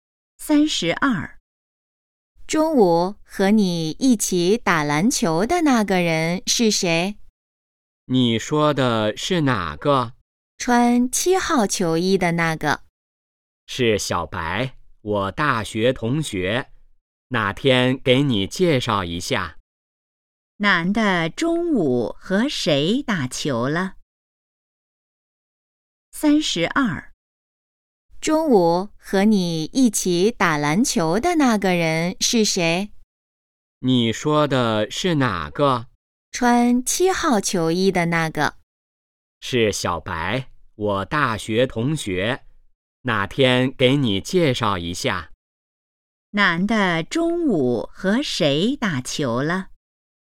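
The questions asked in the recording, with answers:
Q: 男的中午和谁打球了?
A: 小白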